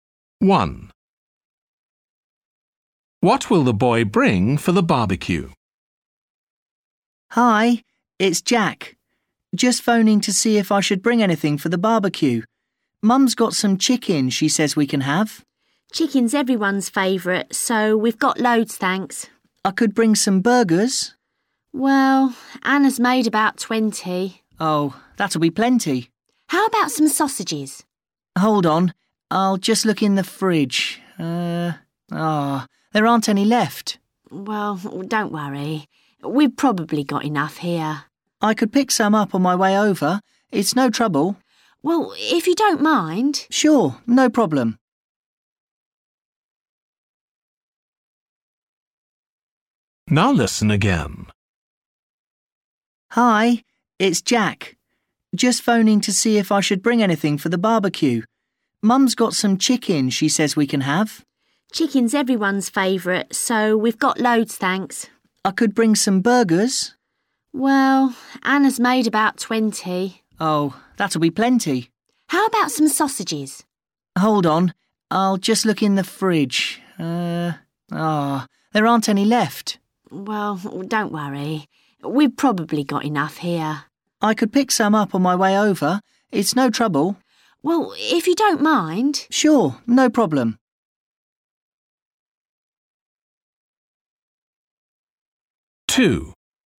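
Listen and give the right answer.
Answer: sausages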